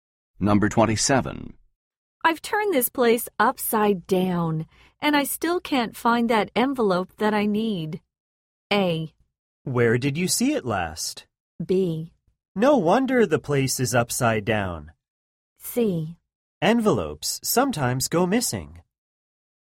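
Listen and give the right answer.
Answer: A: Where did you see it last?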